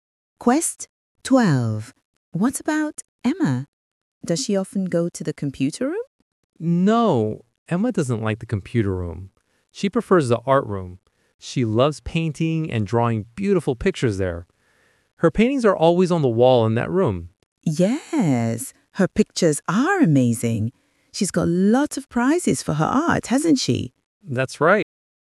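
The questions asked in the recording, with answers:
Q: What about Emma?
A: the art room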